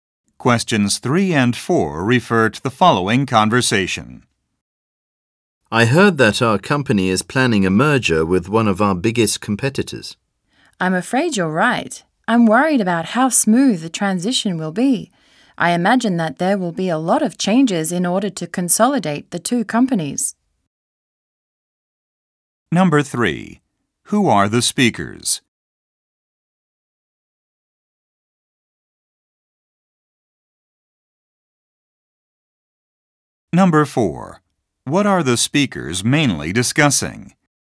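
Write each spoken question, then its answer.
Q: What are the speakers mainly discussing?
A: A planned merger with a competitor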